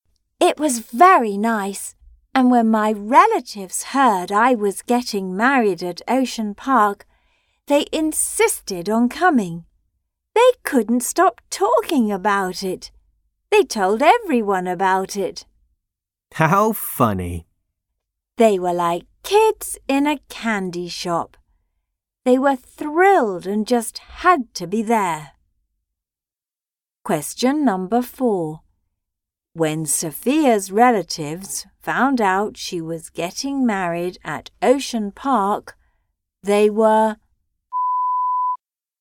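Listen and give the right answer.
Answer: thrilled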